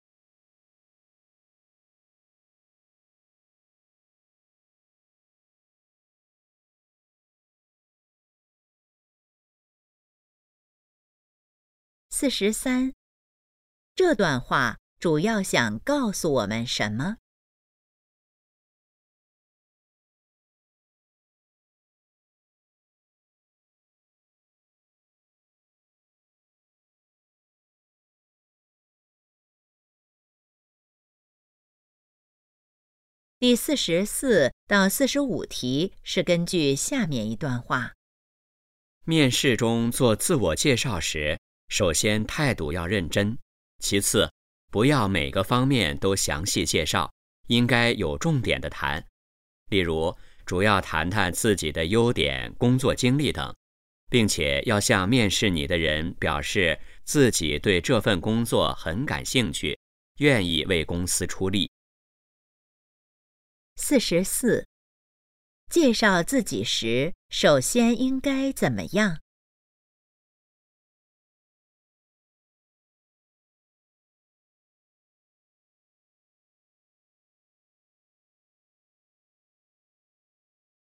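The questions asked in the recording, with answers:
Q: 介绍自己时首先应该怎么样?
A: 态度认真

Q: 这段话主要谈的是什么?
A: 面试时如何做自我介绍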